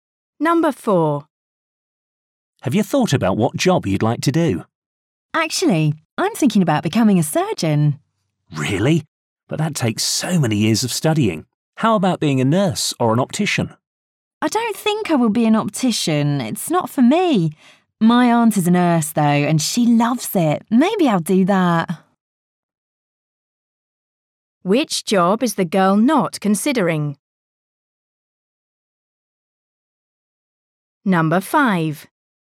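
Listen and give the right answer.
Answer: Optician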